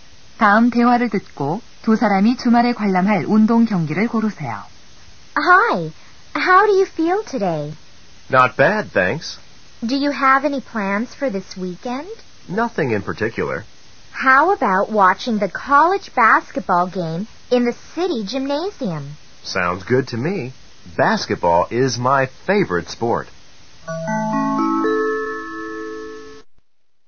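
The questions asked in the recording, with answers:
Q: 다음 대화를 듣고 두 사람이 주말에 관람할 운동 경기를 고르세요.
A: 대학 농구 경기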